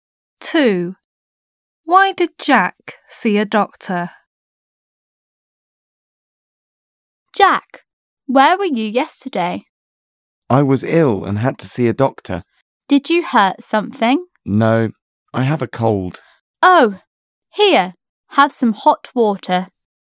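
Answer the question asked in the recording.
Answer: He has a cold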